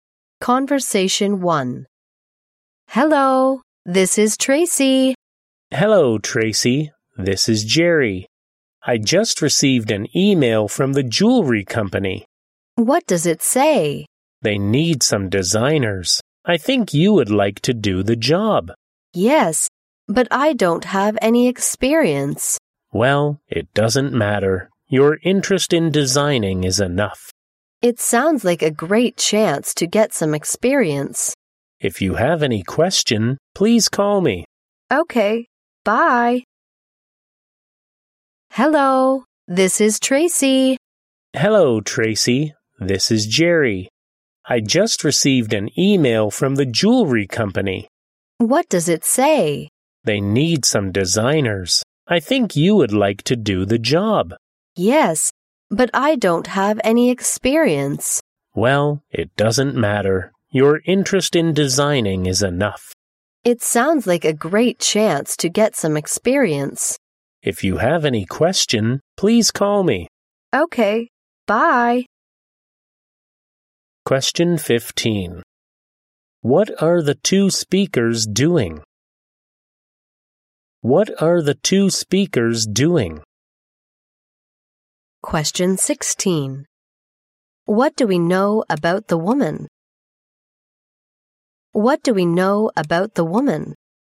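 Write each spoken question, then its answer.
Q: What are the two speakers doing?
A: Talking on the phone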